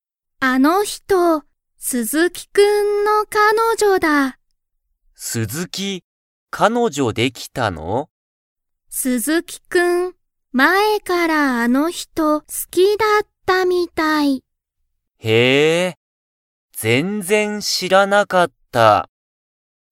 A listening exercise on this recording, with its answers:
鈴木(すずき)くんは、彼女(かのじょ)ができましたか?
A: はい

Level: Level 1